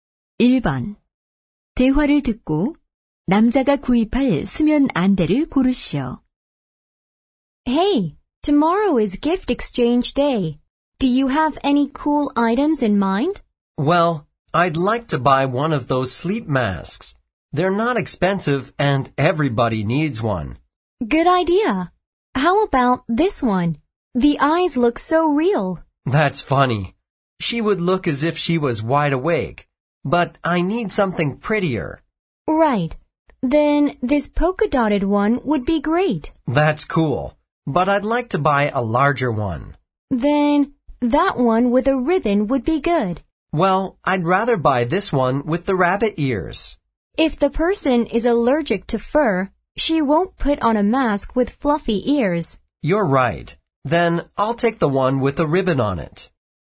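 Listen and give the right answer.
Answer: 리본이 달린 안대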